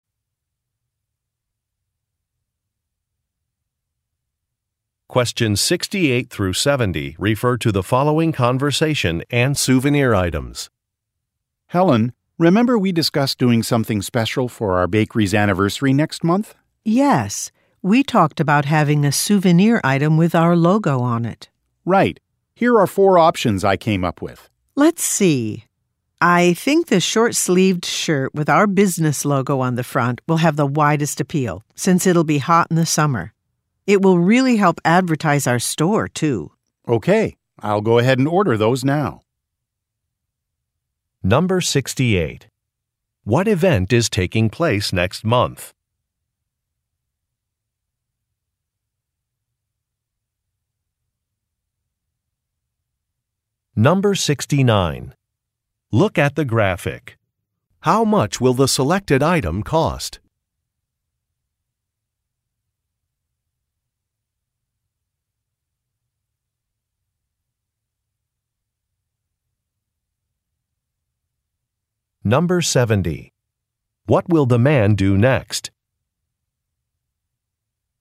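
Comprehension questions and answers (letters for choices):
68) What event is taking place next month?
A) A concert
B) A fund-raiser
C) An anniversary celebration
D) A community festival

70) What will the man do next?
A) Revise a design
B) Search a Website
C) Book a venue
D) Place an order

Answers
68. C
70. D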